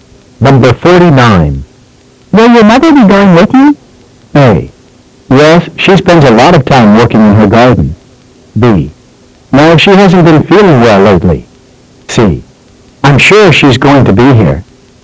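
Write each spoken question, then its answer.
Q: Will your mother be going with you?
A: B: No, she hasn't been feeling well lately.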